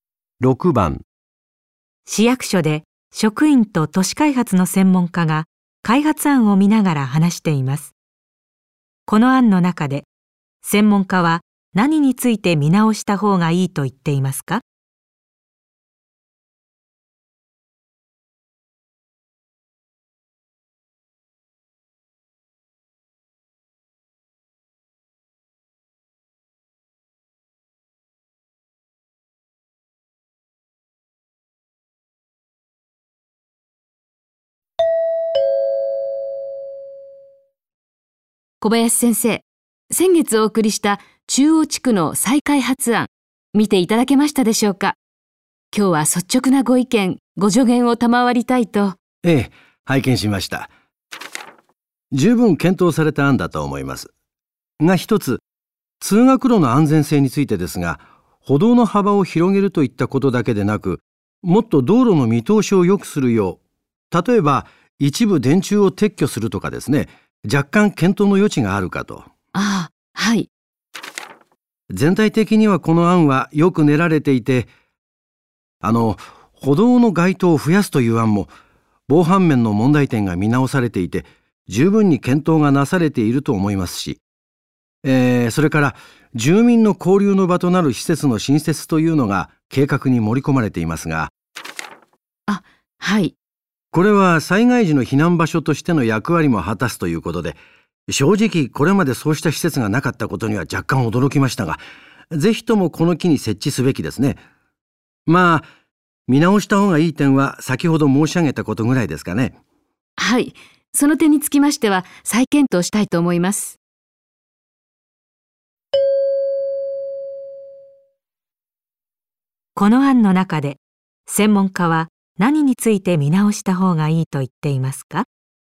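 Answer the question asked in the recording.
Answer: 通学路の見通しを良くすること(電柱の撤去など)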